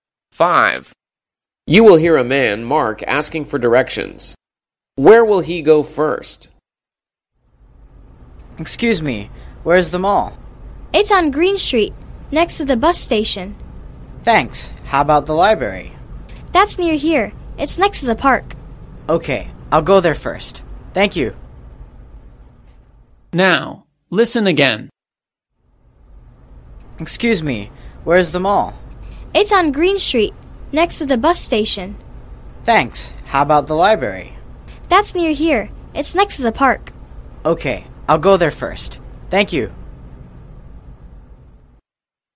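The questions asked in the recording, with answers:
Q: Where will he go first?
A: The library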